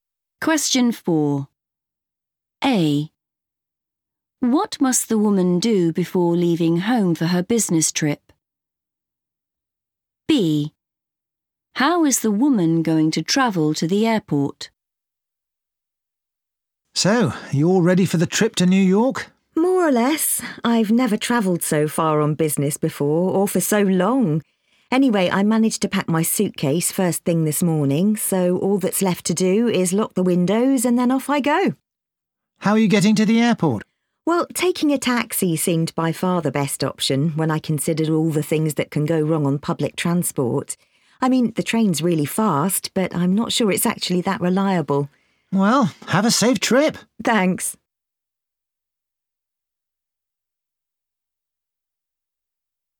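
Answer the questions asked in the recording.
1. lock the windows
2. by taxi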